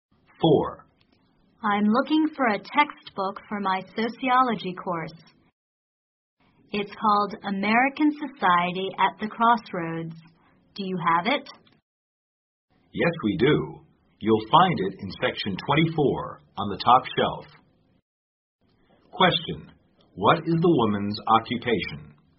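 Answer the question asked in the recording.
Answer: Bookstore clerk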